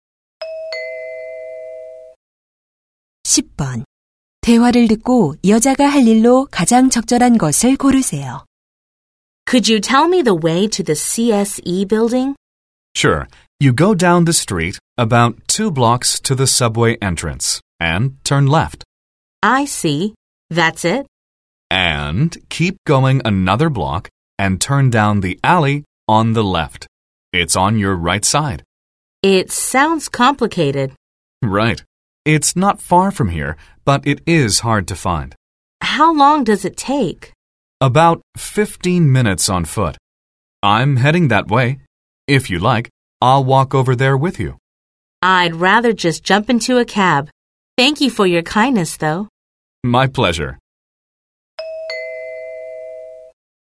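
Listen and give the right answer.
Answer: 택시 타기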